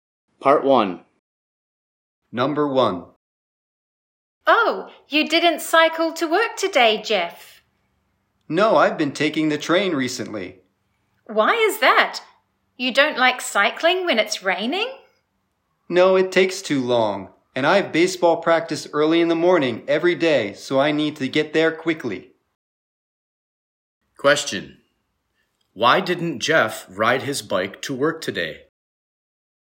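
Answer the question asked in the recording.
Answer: Cycling takes too long and he has early baseball practice every morning, so he needs to get there quickly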